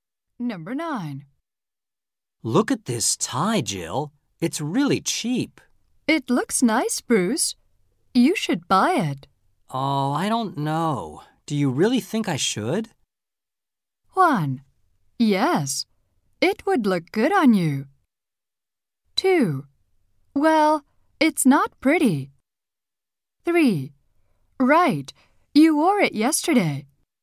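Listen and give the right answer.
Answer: 1: Yes, it would look good on you.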